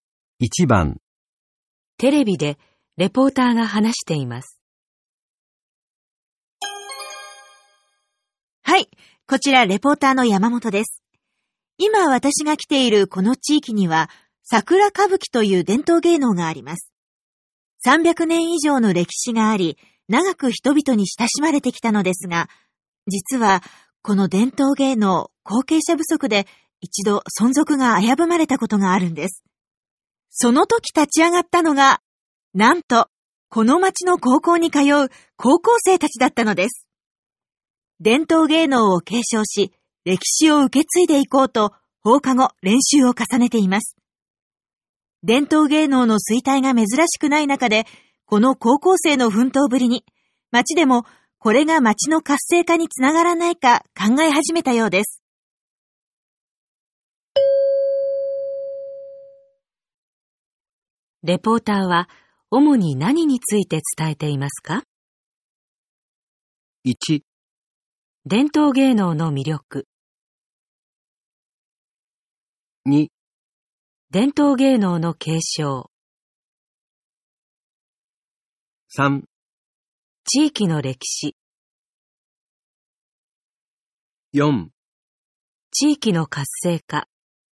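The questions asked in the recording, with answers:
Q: レポーターは主に何について伝えていますか?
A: 2: 伝統芸能の継承。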